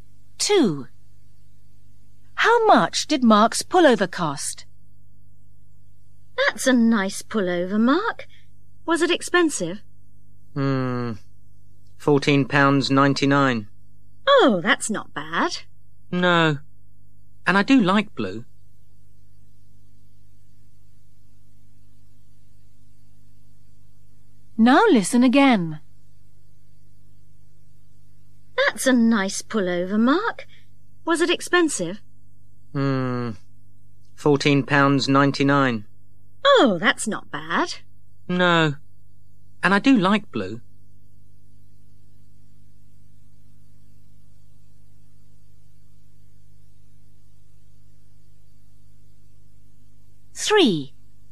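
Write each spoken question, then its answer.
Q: How much did Mark's pullover cost?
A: £14.99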